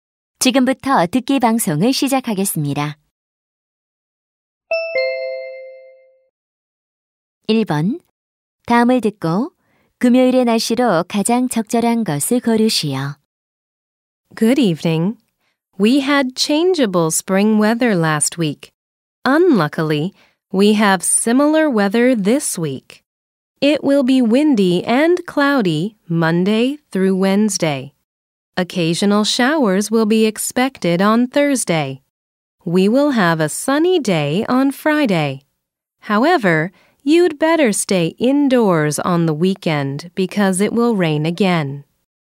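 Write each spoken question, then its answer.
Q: 다음을 듣고 금요일의 날씨로 가장 적절한 것을 고르시오.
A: 맑음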